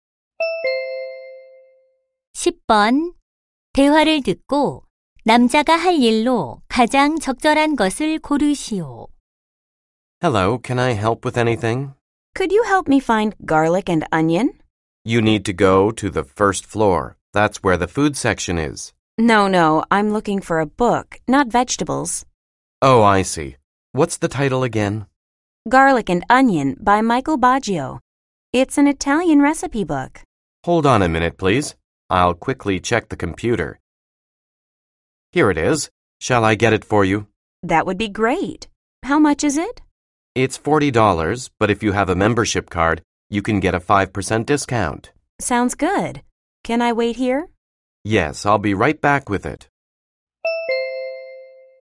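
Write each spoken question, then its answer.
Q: 대화를 듣고 남자가 할 일로 가장 적절한 것을 고르시오.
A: 책 가져다주기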